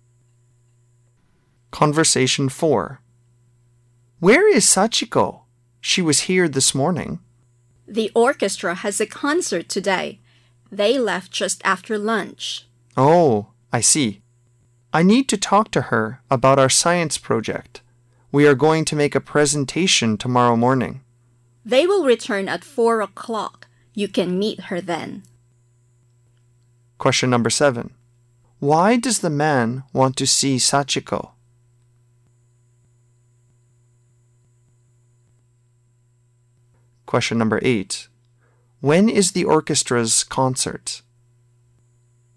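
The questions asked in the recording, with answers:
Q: Why does the man want to see Sachiko?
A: To talk about their science project

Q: When is the orchestra's concert?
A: Today (in the afternoon)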